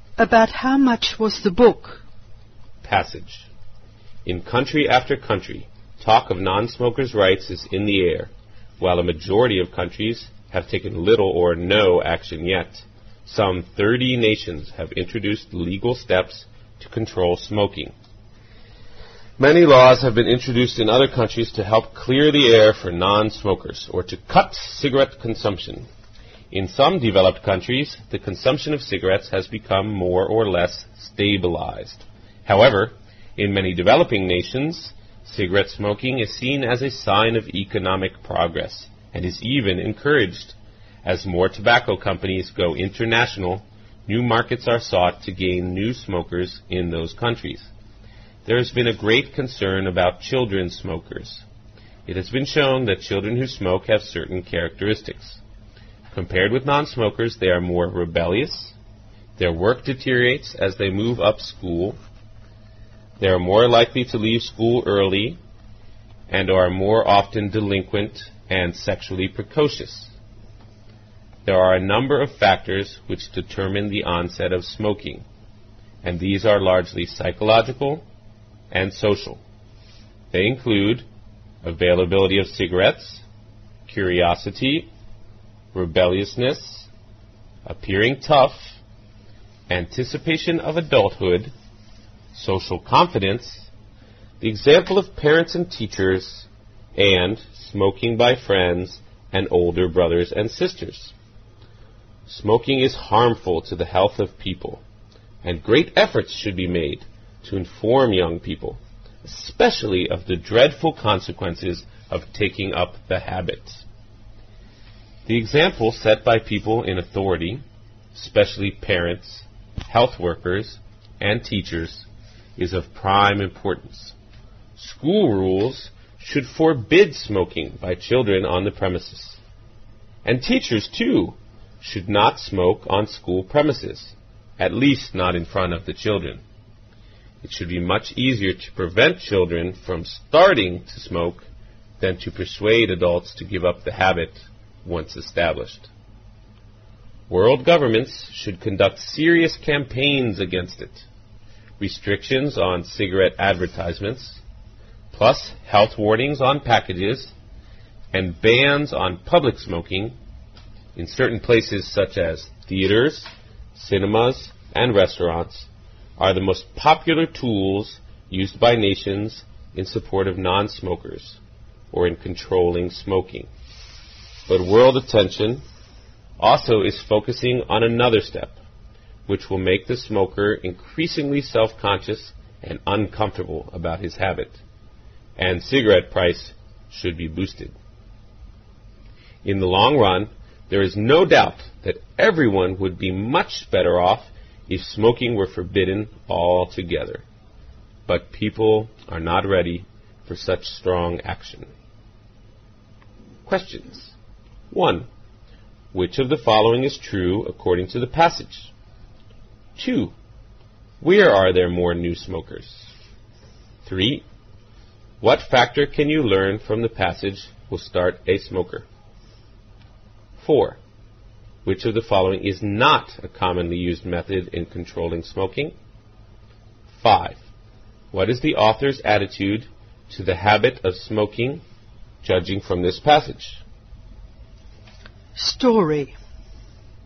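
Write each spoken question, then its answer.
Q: Where are there more new smokers?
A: In developing nations.

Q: What is the author's attitude to the habit of smoking, judging from this passage?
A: He is against it.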